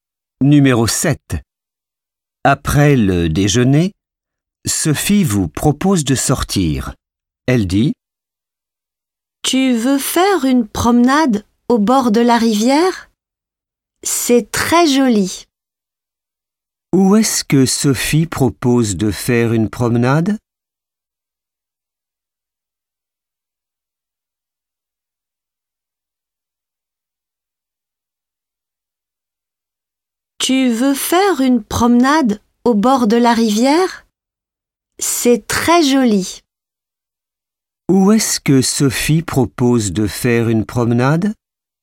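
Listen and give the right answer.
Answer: au bord de la rivière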